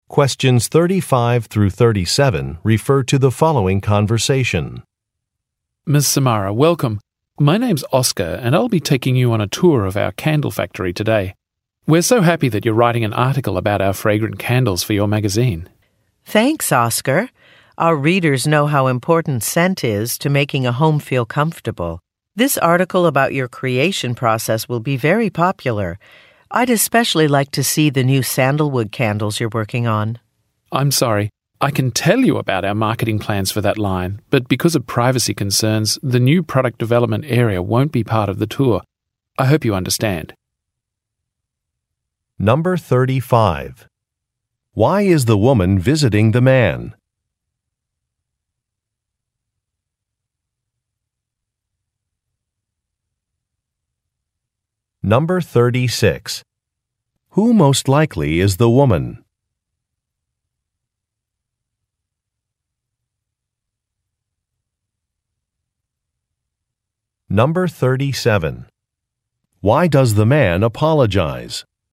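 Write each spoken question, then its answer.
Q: Why is the woman visiting the man?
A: To write a magazine article about the candle factory

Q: Who most likely is the woman?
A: A journalist (magazine writer)

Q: Why does the man apologize?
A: The new product development area is not part of the tour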